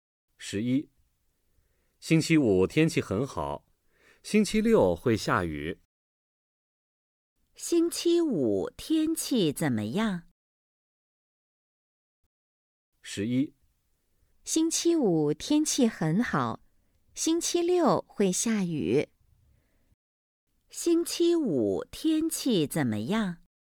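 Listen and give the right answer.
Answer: 很好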